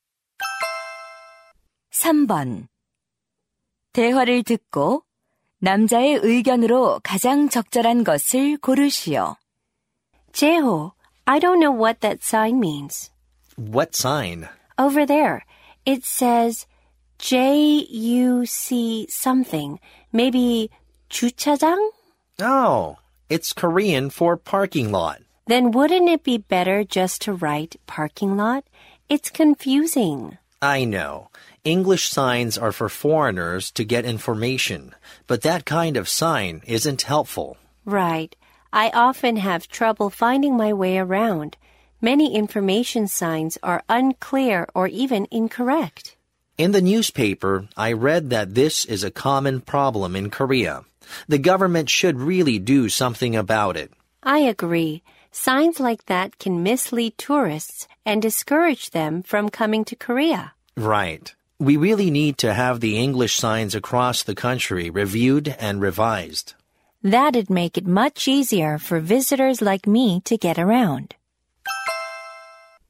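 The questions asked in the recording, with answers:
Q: 대화를 듣고 남자의 의견으로 가장 적절한 것을 고르시오.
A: 잘못된 영어 안내 표지판을 검토하고 수정해야 한다.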